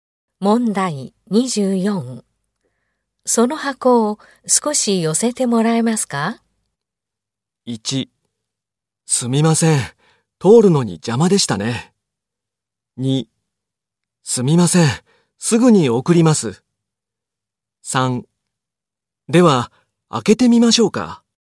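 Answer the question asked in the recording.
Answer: 1: すみません、通るのに邪魔でしたね。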